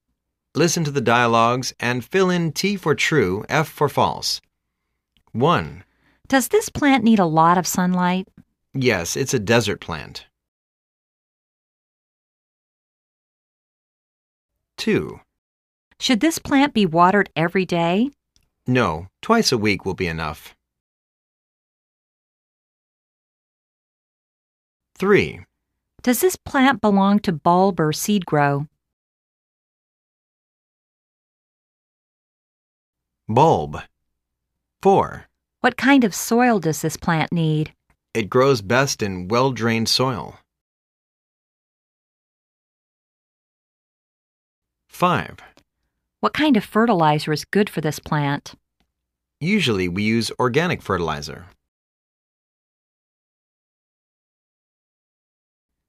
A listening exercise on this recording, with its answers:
Listen to the dialogues and fill in T for "True," F for "False".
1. This plant is suitable to be placed in a sunny spot.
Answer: T

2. This plant needs a lot of water eve ryday.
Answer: F

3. This plant is the bulb plant.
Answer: T

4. This plant required very wet soil.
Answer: F

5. This plant doesn't need any fertilizer.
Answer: F